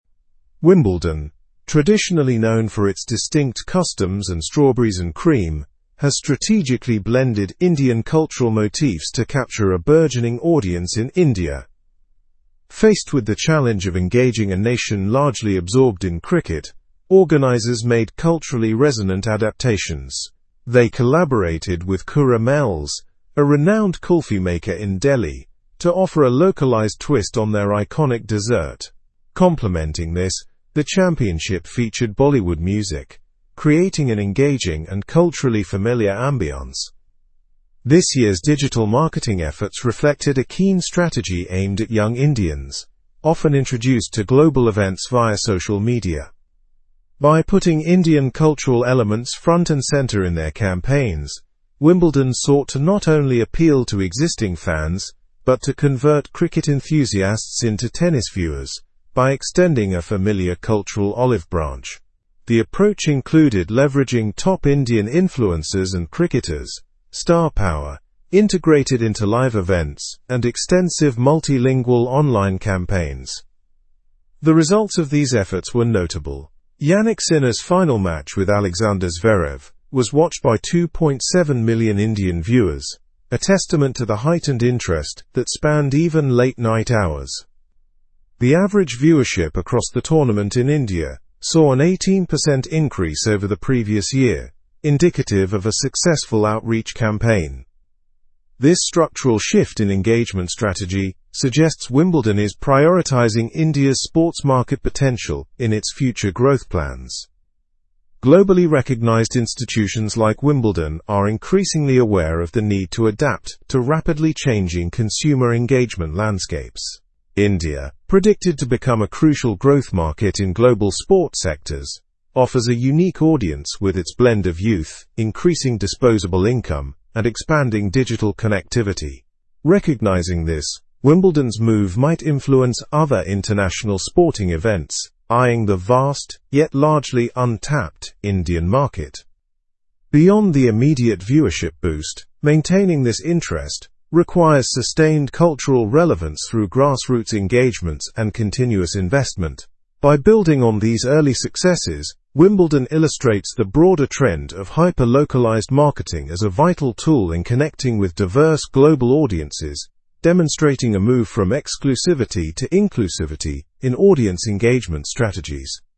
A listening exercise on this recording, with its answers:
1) How did Wimbledon engage with Indian audiences?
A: By incorporating Indian cultural motifs and digital marketing strategies.

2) Why was kulfi introduced as a dessert at Wimbledon?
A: To provide a localized twist on an iconic dessert, appealing to Indian tastes.

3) What role did Bollywood music play in the tournament?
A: It created an engaging and culturally familiar ambiance for Indian viewers.

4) How was digital marketing utilized in Wimbledon's strategy?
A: It aimed at young Indians, using social media to showcase Indian cultural elements.

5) What was the result of Wimbledon's outreach campaign in India?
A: The campaign led to a viewership increase of 18% compared to the previous year.

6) Why is India considered a crucial market for global sports?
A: Due to its young population, rising disposable income, and digital connectivity.

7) What must Wimbledon do to maintain interest among Indian spectators?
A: Invest in sustained cultural relevance and grassroots engagements.

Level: Level 4